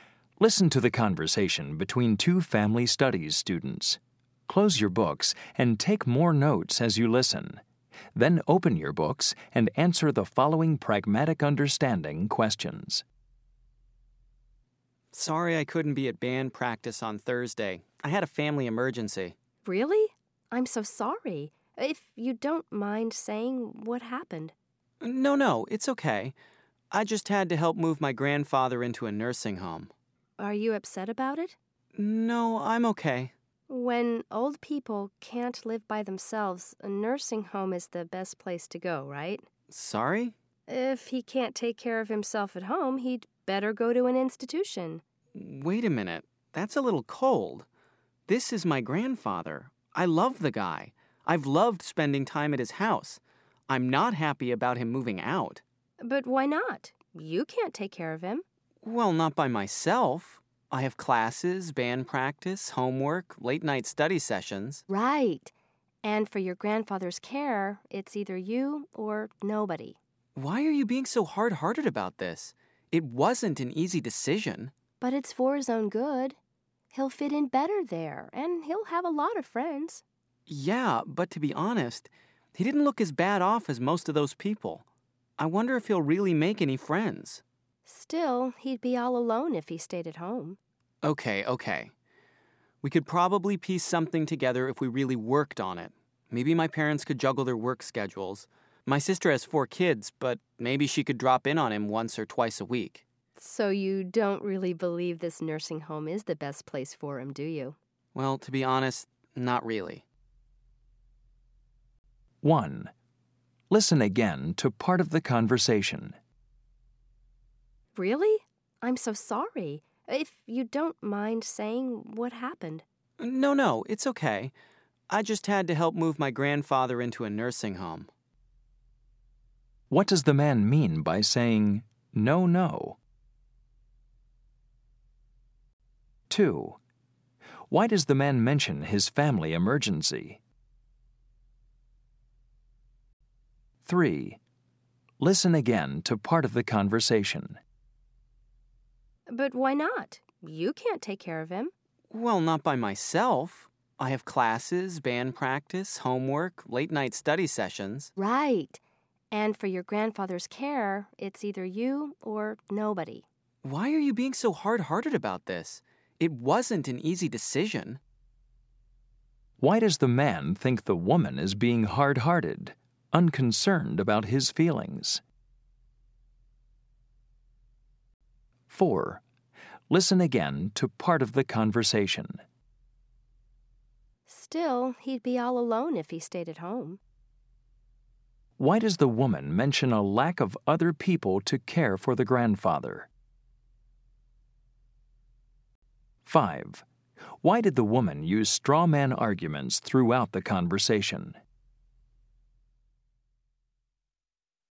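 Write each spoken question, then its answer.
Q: What does the man mean by saying, no?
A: He doesn't mind saying what happened.

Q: Why does the man mention his family emergency?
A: To explain why he missed band practice on Thursday.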